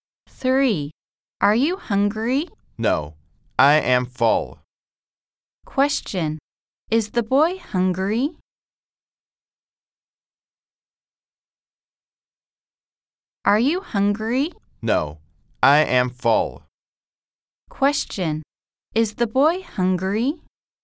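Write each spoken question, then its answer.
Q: Question. Is the boy hungry?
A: No, he is full.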